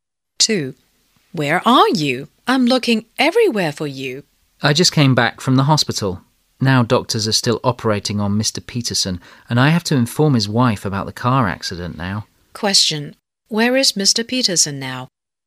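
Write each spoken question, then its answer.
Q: Where is Mr. Peterson now?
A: In the hospital (operating room)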